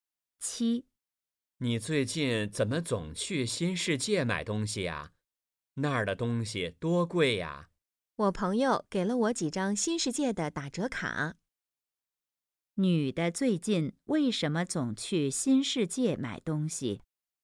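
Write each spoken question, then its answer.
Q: 女的最近为什么总去新世界买东西?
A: 朋友给了她几张新世界的打折卡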